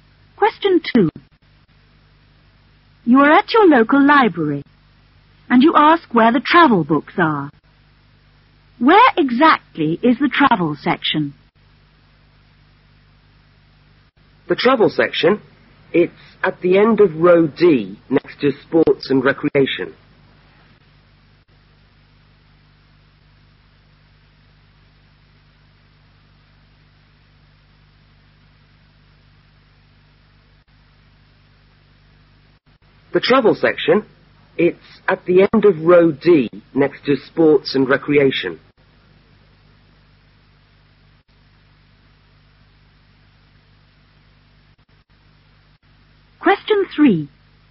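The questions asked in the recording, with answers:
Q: Where exactly is the travel section?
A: At the end of row D, next to sports and recreation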